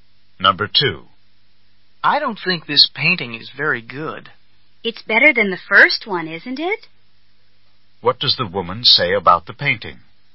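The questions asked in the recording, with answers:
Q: What does the woman say about the painting?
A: It is better than the first one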